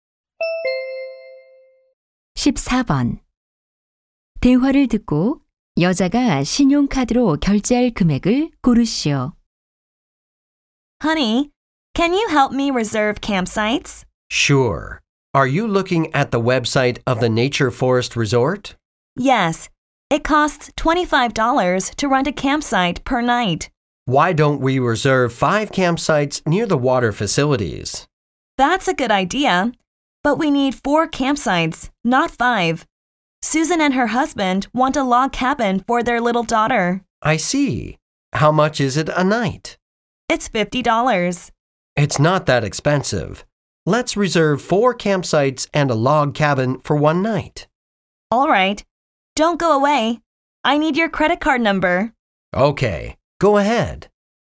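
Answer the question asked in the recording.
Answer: 150달러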